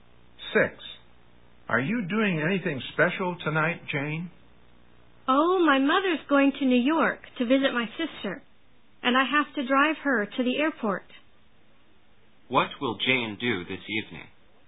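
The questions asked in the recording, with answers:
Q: What will Jane do this evening?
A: Drive her mother to the airport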